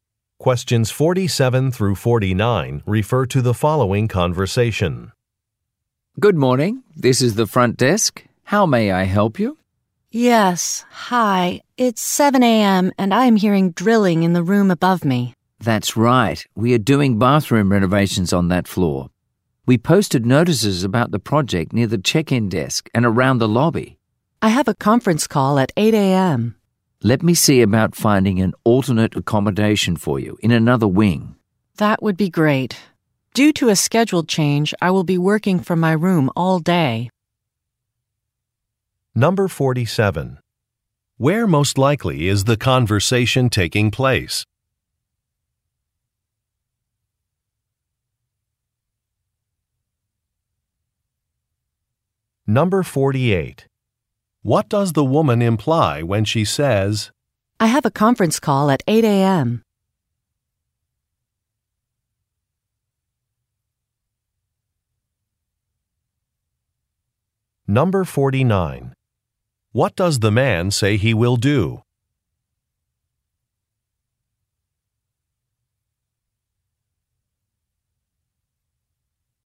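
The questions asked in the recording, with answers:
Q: Where most likely is the conversation taking place?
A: At a hotel

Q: What does the woman imply when she says, I have a conference call at 8 a.m.?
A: The drilling noise will disrupt her call

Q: What does the man say he will do?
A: Try to find her a room in another wing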